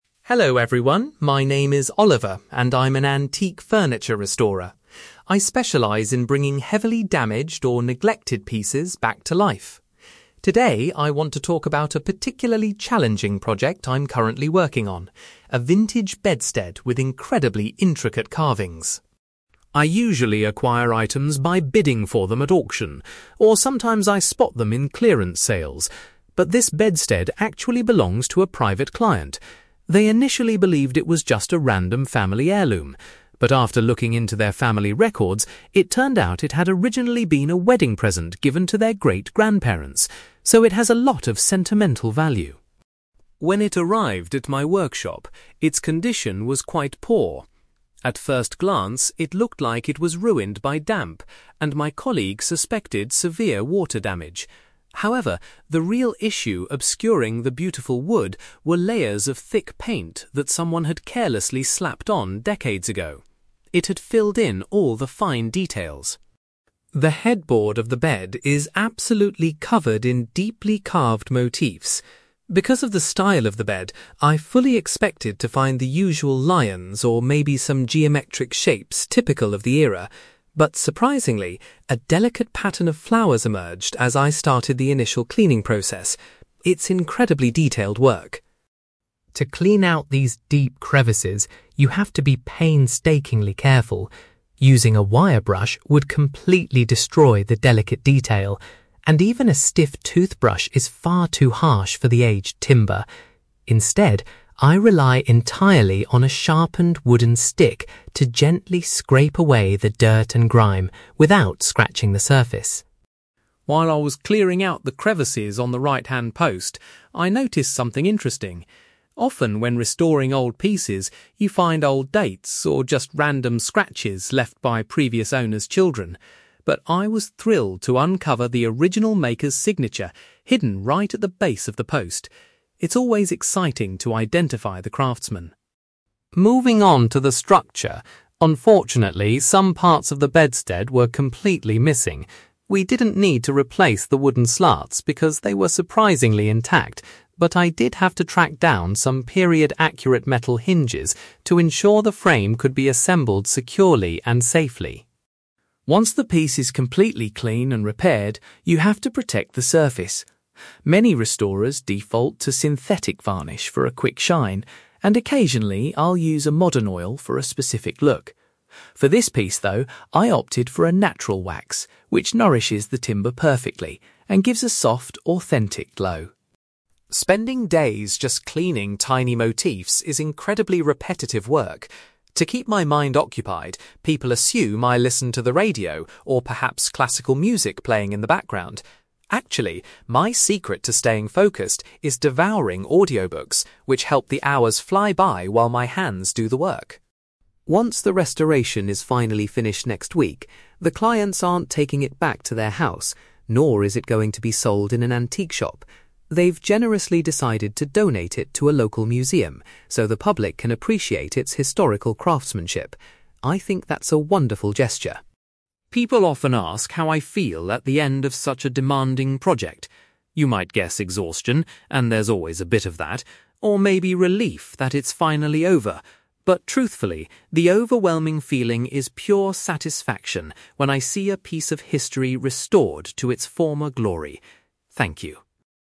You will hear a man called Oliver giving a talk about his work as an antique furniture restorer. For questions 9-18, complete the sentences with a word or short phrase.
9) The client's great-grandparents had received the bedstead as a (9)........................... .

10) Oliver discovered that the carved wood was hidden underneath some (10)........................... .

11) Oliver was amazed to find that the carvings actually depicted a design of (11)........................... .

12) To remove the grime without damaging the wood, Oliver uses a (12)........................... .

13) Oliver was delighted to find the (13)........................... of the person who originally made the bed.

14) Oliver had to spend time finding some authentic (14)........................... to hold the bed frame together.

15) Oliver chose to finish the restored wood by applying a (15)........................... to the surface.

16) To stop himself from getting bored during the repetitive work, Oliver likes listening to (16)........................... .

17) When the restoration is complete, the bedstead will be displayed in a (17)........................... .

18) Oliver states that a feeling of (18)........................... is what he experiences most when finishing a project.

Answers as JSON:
{"9": "wedding present", "10": "thick paint", "11": "flowers", "12": "wooden stick", "13": "signature", "14": "metal hinges", "15": "natural wax", "16": "audiobooks", "17": "local museum", "18": "satisfaction"}

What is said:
Oliver: Hello everyone, my name is Oliver, and I'm an antique furniture restorer. I specialize in bringing heavily damaged or neglected pieces back to life. Today, I want to talk about a particularly challenging project I'm currently working on: a vintage bedstead with incredibly intricate carvings.
I usually acquire items by bidding for them at auction, or sometimes I spot them in clearance sales. But this bedstead actually belongs to a private client. They initially believed it was just a random family heirloom, but after looking into their family records, it turned out it had originally been a wedding present given to their great-grandparents. So, it has a lot of sentimental value.
When it arrived at my workshop, its condition was quite poor. At first glance, it looked like it was ruined by damp, and my colleague suspected severe water damage. However, the real issue obscuring the beautiful wood was layers of thick paint that someone had carelessly slapped on decades ago. It had filled in all the fine details.
The headboard of the bed is absolutely covered in deeply carved motifs. Because of the style of the bed, I fully expected to find the usual lions or maybe some geometric shapes typical of the era. But surprisingly, a delicate pattern of flowers emerged as I started the initial cleaning process. It's incredibly detailed work.
To clean out these deep crevices, you have to be painstakingly careful. Using a wire brush would completely destroy the delicate detail, and even a stiff toothbrush is far too harsh for the aged timber. Instead, I rely entirely on a sharpened wooden stick to gently scrape away the dirt and grime without scratching the surface.
While I was clearing out the crevices on the right-hand post, I noticed something interesting. Often when restoring old pieces, you find old dates or just random scratches left by previous owners' children. But I was thrilled to uncover the original maker's signature hidden right at the base of the post. It's always exciting to identify the craftsman.
Moving on to the structure, unfortunately, some parts of the bedstead were completely missing. We didn't need to replace the wooden slats, because they were surprisingly intact. But I did have to track down some period-accurate metal hinges to ensure the frame could be assembled securely and safely.
Once the piece is completely clean and repaired, you have to protect the surface. Many restorers default to synthetic varnish for a quick shine, and occasionally I'll use a modern oil for a specific look. For this piece, though, I opted for a natural wax, which nourishes the timber perfectly and gives a soft, authentic glow.
Spending days just cleaning tiny motifs is incredibly repetitive work. To keep my mind occupied, people assume I listen to the radio or perhaps classical music playing in the background. Actually, my secret to staying focused is devouring audiobooks, which help the hours fly by while my hands do the work.
Once the restoration is finally finished next week, the clients aren't taking it back to their house, nor is it going to be sold in an antique shop. They've generously decided to donate it to a local museum so the public can appreciate its historical craftsmanship. I think that's a wonderful gesture.
People often ask how I feel at the end of such a demanding project. You might guess exhaustion, and there's always a bit of that, or maybe relief that it's finally over. But truthfully, the overwhelming feeling is pure satisfaction when I see a piece of history restored to its former glory. Thank you.

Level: B2